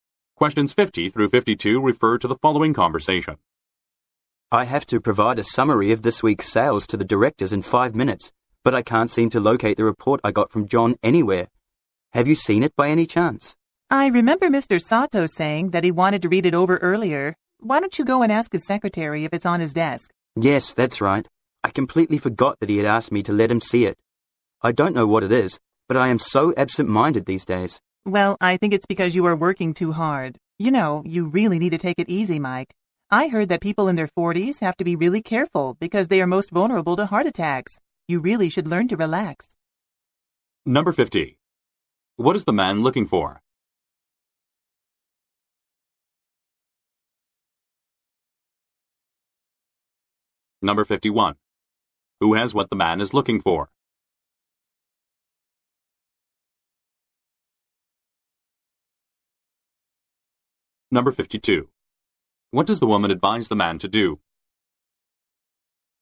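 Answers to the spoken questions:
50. The sales report he got from John
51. Mr. Sato
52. Relax and take it easy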